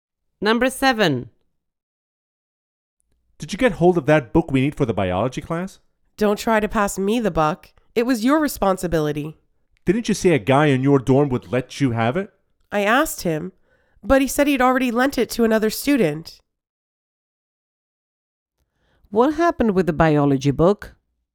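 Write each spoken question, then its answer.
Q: What happened with the biology book?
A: The guy had already lent it to another student, so they didn't get it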